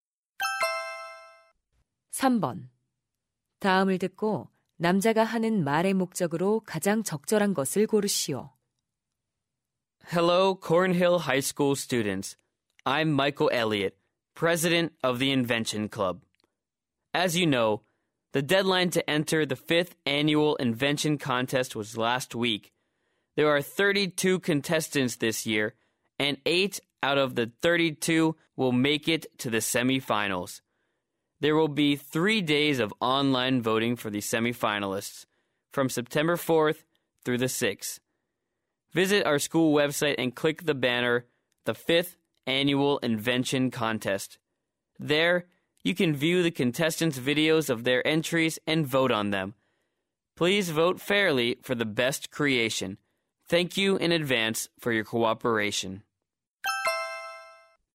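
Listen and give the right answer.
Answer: 발명 대회 준결승 진출자에 대한 온라인 투표 참여를 독려하려고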